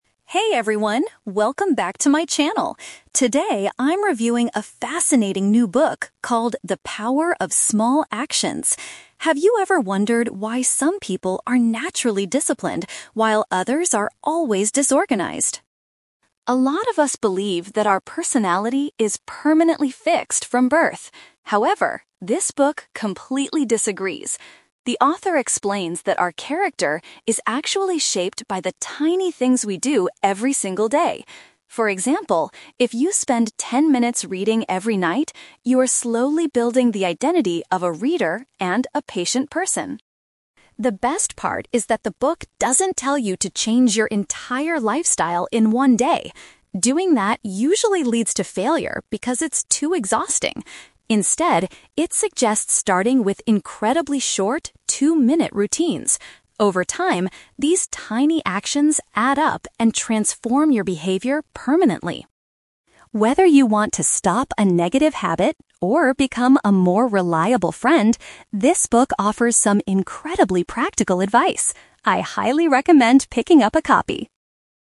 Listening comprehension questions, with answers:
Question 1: According to the book, what truly determines a person's character?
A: The small habits they repeat on a daily basis.

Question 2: What method does the author recommend for improving yourself?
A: Starting with very brief and simple activities.

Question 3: Who does the vlogger think would benefit from this book?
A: People who want to get rid of their bad habits.

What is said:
Vlogger: Hey everyone, welcome back to my channel! Today, I'm reviewing a fascinating new book called The Power of Small Actions. Have you ever wondered why some people are naturally disciplined while others are always disorganized?
A lot of us believe that our personality is permanently fixed from birth. However, this book completely disagrees. The author explains that our character is actually shaped by the tiny things we do every single day. For example, if you spend ten minutes reading every night, you are slowly building the identity of a 'reader' and a 'patient person'.
The best part is that the book doesn't tell you to change your entire lifestyle in one day. Doing that usually leads to failure because it's too exhausting. Instead, it suggests starting with incredibly short, two-minute routines. Over time, these tiny actions add up and transform your behavior permanently.
Whether you want to stop a negative habit or become a more reliable friend, this book offers some incredibly practical advice. I highly recommend picking up a copy!